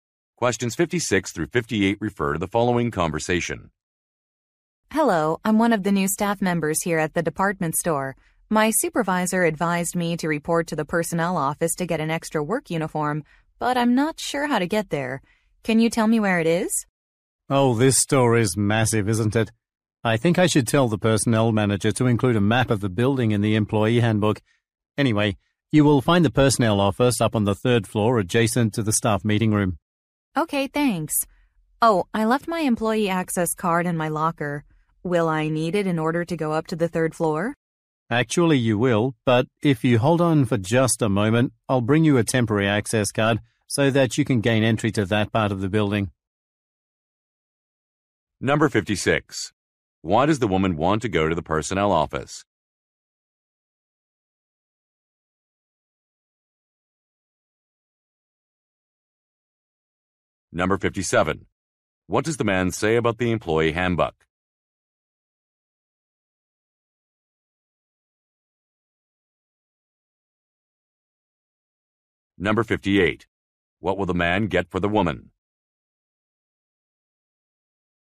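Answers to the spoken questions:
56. To get an extra work uniform
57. It should include a map of the building
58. A temporary access card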